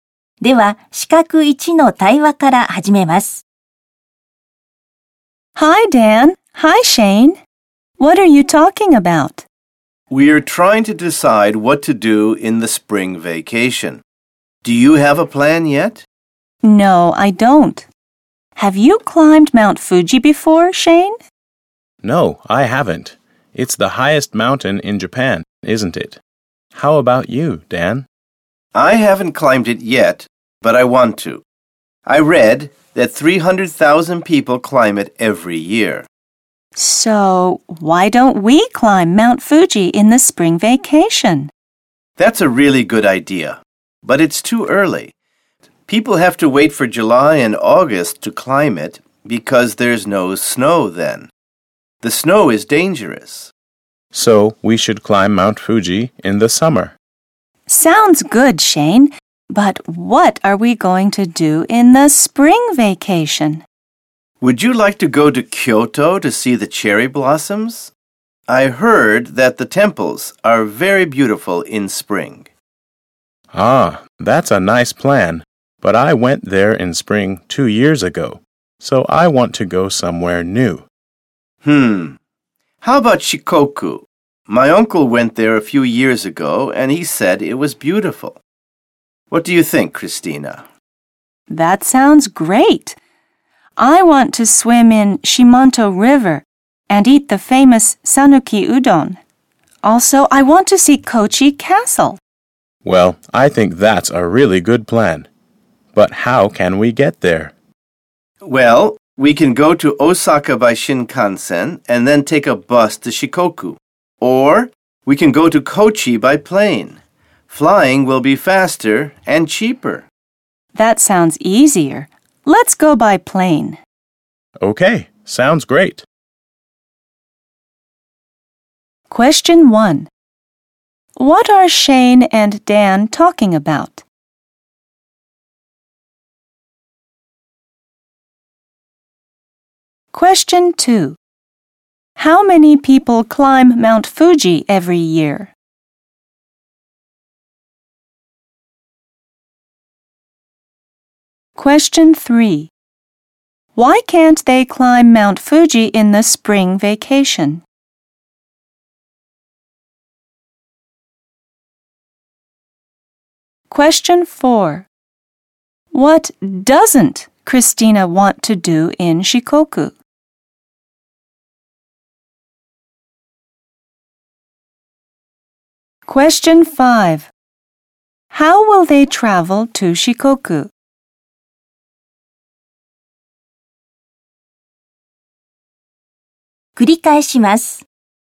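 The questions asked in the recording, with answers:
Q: What are Shane and Dan talking about?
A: What to do in the spring vacation

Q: How many people climb Mount Fuji every year?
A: 300,000 people

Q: Why can't they climb Mount Fuji in the spring vacation?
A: Because there is still snow, which is dangerous

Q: How will they travel to Shikoku?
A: By plane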